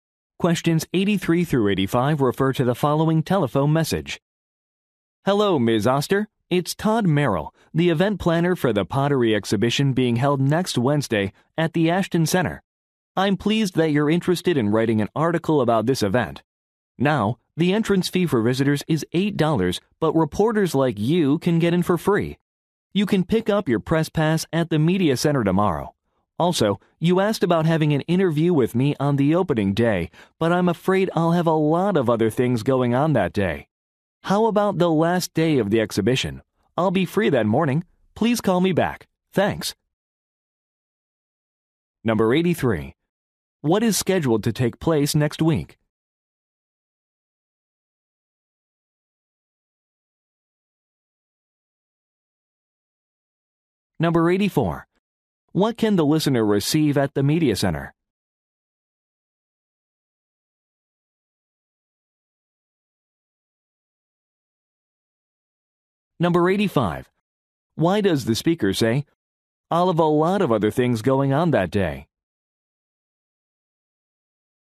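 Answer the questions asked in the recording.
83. A pottery exhibition
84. A press pass
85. He cannot do the interview on the opening day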